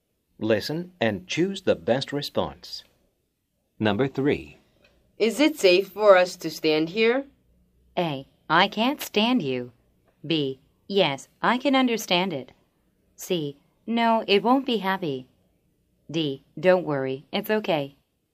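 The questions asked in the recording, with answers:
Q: Is it safe for us to stand here?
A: D: Don't worry, it's okay.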